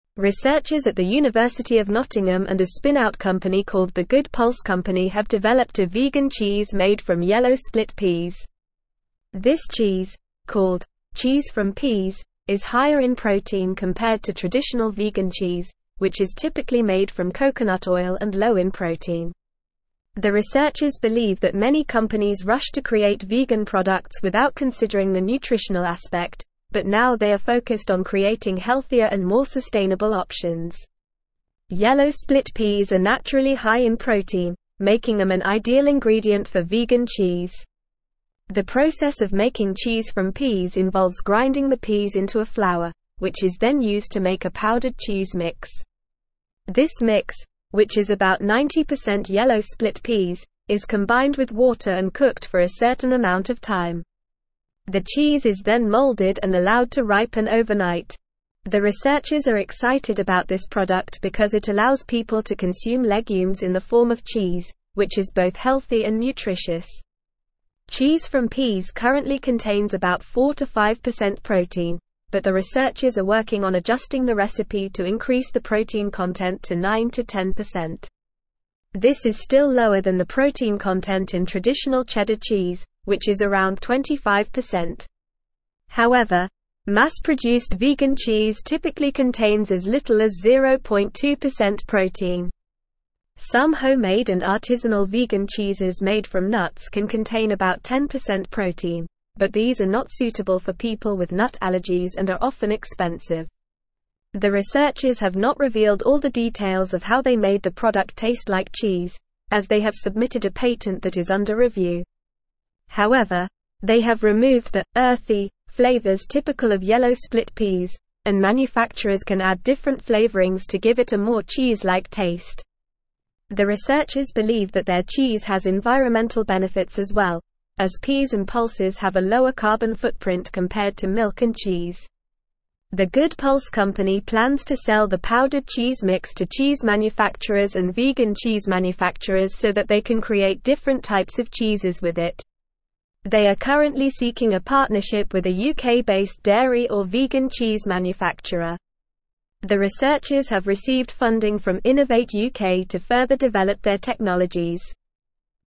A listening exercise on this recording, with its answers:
Listen and Fill in the Gaps:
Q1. Researchers at the University of Nottingham and a spin-out company (1)______ The Good Pulse Company have (2)______ a vegan cheese made from yellow split peas.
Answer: called

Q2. Researchers at the University of Nottingham and a spin-out company (1)______ The Good Pulse Company have (2)______ a vegan cheese made from yellow split peas.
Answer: developed

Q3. This cheese, called "Cheese from Peas," is higher in protein (3)______ to traditional vegan cheese, which is typically made from coconut oil and low in protein.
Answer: compared

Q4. The researchers believe that many companies (4)______ to create vegan products without considering the nutritional aspect, but now they are focused on creating healthier and more sustainable options.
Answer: rushed

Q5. This mix, which is about 90% (5)______ split peas, is combined with water and cooked for a certain amount of time.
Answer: yellow

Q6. The (6)______ are excited about this (7)______ because it allows people to consume legumes in the form of cheese, which is both healthy and nutritious.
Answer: researchers

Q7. The (6)______ are excited about this (7)______ because it allows people to consume legumes in the form of cheese, which is both healthy and nutritious.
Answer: product

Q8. Cheese from Peas currently (8)______ about 4-5% protein, but the researchers are working on adjusting the recipe to increase the protein content to 9-10%.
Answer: contains

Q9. This is still lower than the (9)______ content in traditional (10)______ cheese, which is around 25%.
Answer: protein

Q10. This is still lower than the (9)______ content in traditional (10)______ cheese, which is around 25%.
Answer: cheddar

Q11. Some homemade and artisanal vegan cheeses made from nuts can contain about 10% protein, but these are not suitable for people with nut allergies and are often (11)______.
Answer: expensive

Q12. The researchers have not revealed all the details of how they made the product taste like cheese, as they have submitted a patent that is under (12)______.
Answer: review

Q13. However, they have removed the "earthy" flavors typical of yellow split peas, and (13)______s can add different (14)______ to give it a more cheese-like taste.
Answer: manufacturer

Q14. However, they have removed the "earthy" flavors typical of yellow split peas, and (13)______s can add different (14)______ to give it a more cheese-like taste.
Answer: flavorings

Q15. The researchers believe that their cheese has environmental benefits as well, as peas and (15)______ have a lower carbon footprint compared to milk and cheese.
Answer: pulses

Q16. The Good Pulse Company plans to sell the powdered cheese mix to cheese manufacturers and (16)______ cheese manufacturers so that they can create different types of cheeses with it.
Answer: vegan

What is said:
Researchers at the University of Nottingham and a spin-out company called The Good Pulse Company have developed a vegan cheese made from yellow split peas. This cheese, called "Cheese from Peas," is higher in protein compared to traditional vegan cheese, which is typically made from coconut oil and low in protein. The researchers believe that many companies rushed to create vegan products without considering the nutritional aspect, but now they are focused on creating healthier and more sustainable options. Yellow split peas are naturally high in protein, making them an ideal ingredient for vegan cheese.
The process of making Cheese from Peas involves grinding the peas into a flour, which is then used to make a powdered cheese mix. This mix, which is about 90% yellow split peas, is combined with water and cooked for a certain amount of time. The cheese is then molded and allowed to ripen overnight. The researchers are excited about this product because it allows people to consume legumes in the form of cheese, which is both healthy and nutritious.
Cheese from Peas currently contains about 4-5% protein, but the researchers are working on adjusting the recipe to increase the protein content to 9-10%. This is still lower than the protein content in traditional cheddar cheese, which is around 25%. However, mass-produced vegan cheese typically contains as little as 0.2% protein. Some homemade and artisanal vegan cheeses made from nuts can contain about 10% protein, but these are not suitable for people with nut allergies and are often expensive.
The researchers have not revealed all the details of how they made the product taste like cheese, as they have submitted a patent that is under review. However, they have removed the "earthy" flavors typical of yellow split peas, and manufacturers can add different flavorings to give it a more cheese-like taste. The researchers believe that their cheese has environmental benefits as well, as peas and pulses have a lower carbon footprint compared to milk and cheese.
The Good Pulse Company plans to sell the powdered cheese mix to cheese manufacturers and vegan cheese manufacturers so that they can create different types of cheeses with it. They are currently seeking a partnership with a UK-based dairy or vegan cheese manufacturer. The researchers have received funding from Innovate UK to further develop their technologies.

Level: Level 4